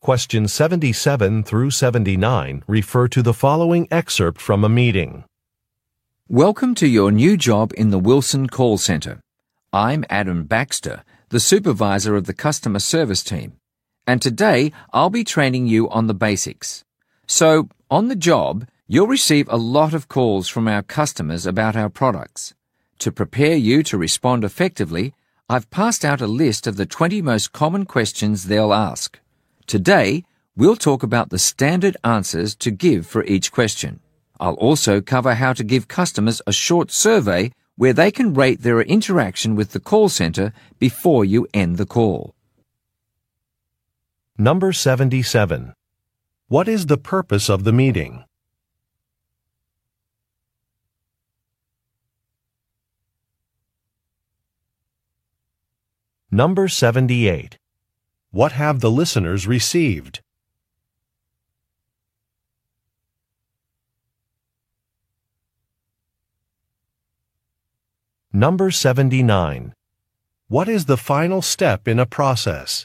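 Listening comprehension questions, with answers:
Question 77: What is the purpose of the meeting?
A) To revise a staff manual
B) To train customer service employees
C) To review some réumés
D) To present a product to clients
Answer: B) To train customer service employees

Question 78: What have the listeners received?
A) A list of typical questions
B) A review of potential vendors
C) An advertising brochure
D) An updated meeting agenda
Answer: A) A list of typical questions

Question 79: What is the final step in a process?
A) Charging a credit card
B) Signing a contract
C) Conducting a survey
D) Filing a document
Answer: C) Conducting a survey

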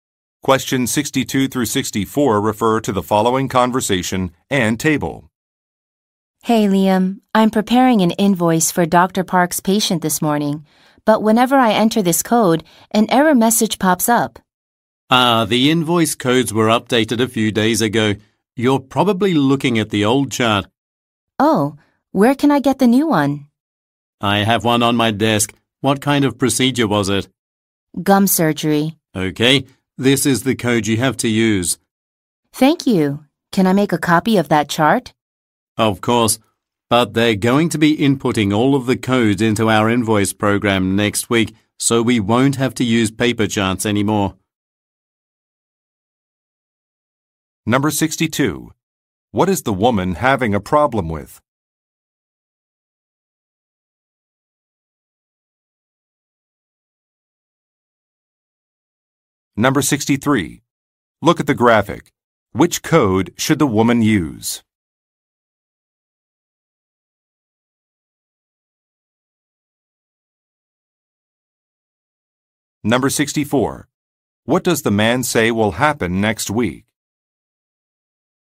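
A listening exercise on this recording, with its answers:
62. What is the woman having a problem with?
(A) Making an invoice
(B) Locating a package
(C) Performing a surgery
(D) Calling a patient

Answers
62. (A) Making an invoice

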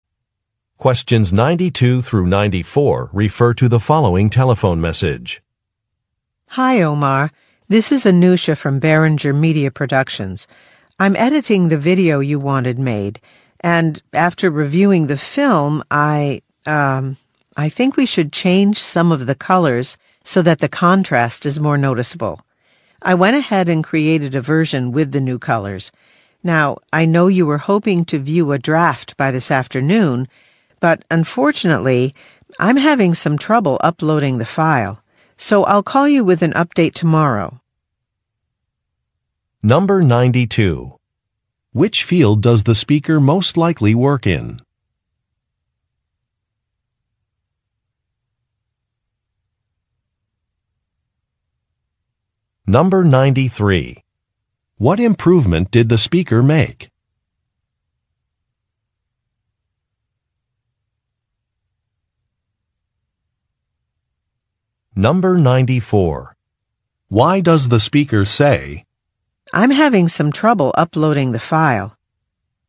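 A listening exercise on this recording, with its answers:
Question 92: Which field does the speaker most likely work in?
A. Film production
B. Interior design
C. Computer programming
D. Broadcast journalism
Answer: A. Film production

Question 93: What improvement did the speaker make?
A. She hired more staff.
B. She used different software.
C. She changed some colors.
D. She talked to a specialist.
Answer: C. She changed some colors.

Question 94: Why does the speaker say, "I'm having some trouble uploading the file"?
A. To request some new equipment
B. To complain about a policy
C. To ask for help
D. To explain a delay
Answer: D. To explain a delay

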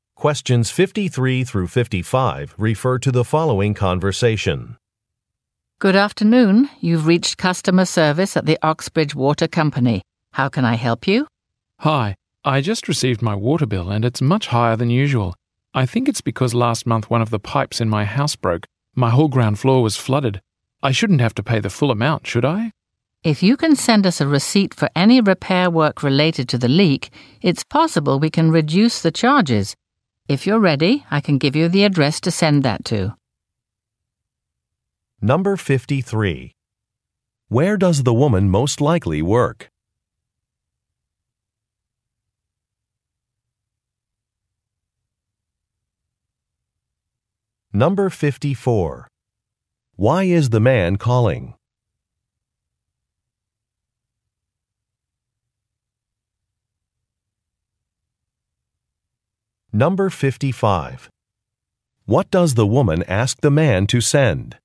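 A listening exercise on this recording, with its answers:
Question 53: Where does the woman most likely work?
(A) At a bank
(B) At a home goods store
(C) At a utility company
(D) At an apartment management agency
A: (C) At a utility company

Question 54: Why is the man calling?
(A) To open an account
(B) To request a fee reduction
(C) To cancel an inspection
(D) To reserve some materials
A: (B) To request a fee reduction

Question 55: What does the woman ask the man to send?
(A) A copy of a warranty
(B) A completed survey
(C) A receipt for a repair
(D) A deposit payment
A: (C) A receipt for a repair

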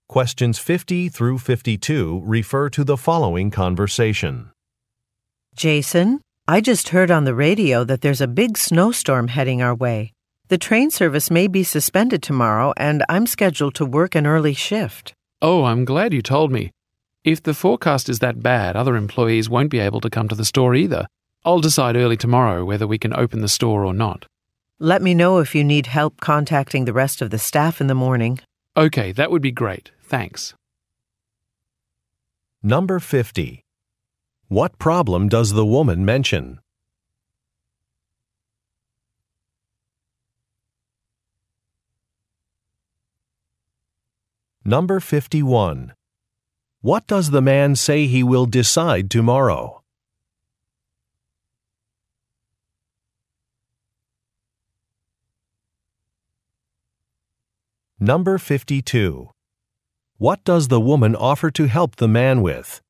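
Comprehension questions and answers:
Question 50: What problem does the woman mention?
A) Customer complaints have increased.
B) Bad weather has been predicted.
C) Parking in the area is expensive.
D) The sales forecast is delayed.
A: B) Bad weather has been predicted.

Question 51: What does the man say he will decide tomorrow?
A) Whether the store will remain closed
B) Whether additional employees should be hired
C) When he will launch a new ad campaign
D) When he will meet with investors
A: A) Whether the store will remain closed

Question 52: What does the woman offer to help the man with?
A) Organizing a workshop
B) Making a work schedule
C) Contacting employees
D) Calling a consultant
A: C) Contacting employees

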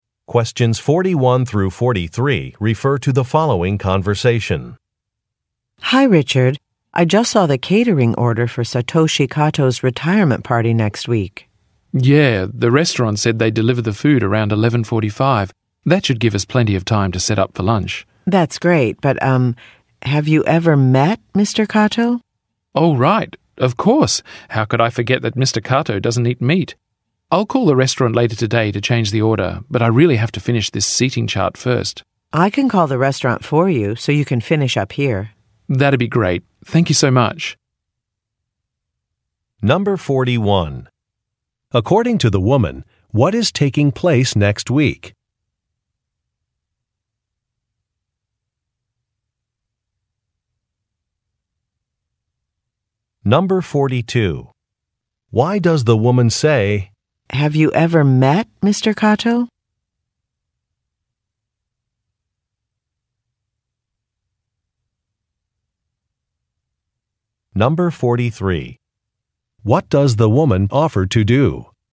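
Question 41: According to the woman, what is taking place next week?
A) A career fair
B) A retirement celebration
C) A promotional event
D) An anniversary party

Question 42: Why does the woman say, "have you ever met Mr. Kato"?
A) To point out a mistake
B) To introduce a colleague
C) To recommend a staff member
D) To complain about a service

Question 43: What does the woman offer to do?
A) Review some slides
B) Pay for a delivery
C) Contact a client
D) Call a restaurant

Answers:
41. B) A retirement celebration
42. A) To point out a mistake
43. D) Call a restaurant

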